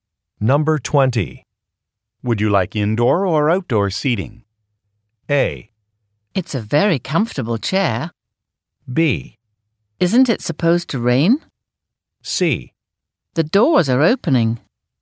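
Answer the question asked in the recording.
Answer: B: Isn't it supposed to rain?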